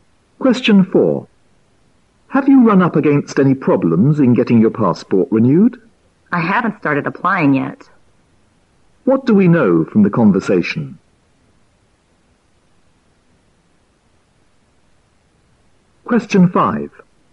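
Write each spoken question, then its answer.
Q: What do we know from the conversation?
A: The man hasn't applied to renew his passport yet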